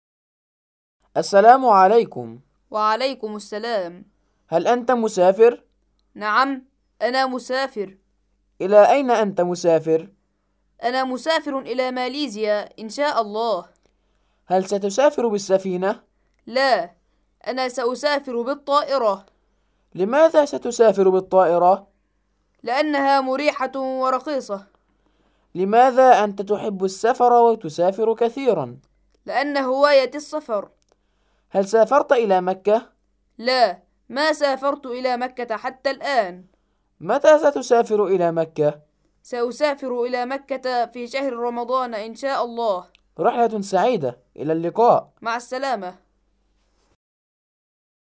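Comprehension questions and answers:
الأسئلة الآتية بـ () أو (x): (5 درجات)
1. أحمد مسافر إلى ماليزيا ( )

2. أحمد سيسافر بالسفينة ( )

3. أحمد سيسافر بالسفينة لأنها مريحة ورخيصة ( )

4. أحمد يحب السفر ويسافر كثيرا ( )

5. سيسافر أحمد إلى مكة في موسم الحج ( )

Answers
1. صح
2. خطأ
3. خطأ
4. صح
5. خطأ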